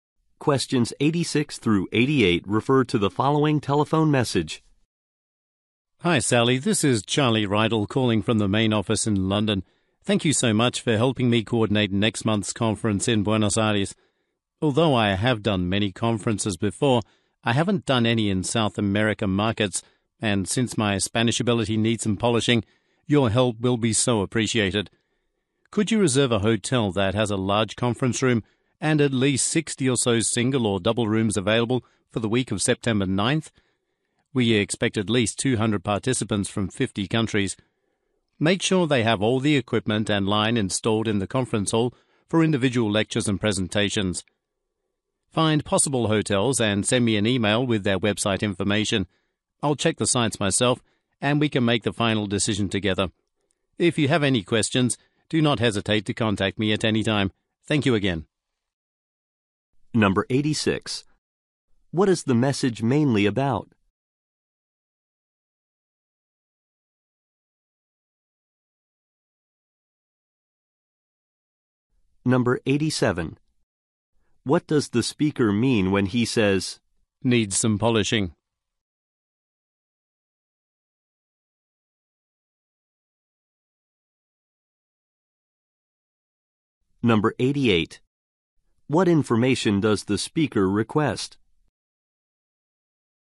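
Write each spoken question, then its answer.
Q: What is the message mainly about?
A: Organizing a conference in Buenos Aires

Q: What information does the speaker request?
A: Website information of possible hotels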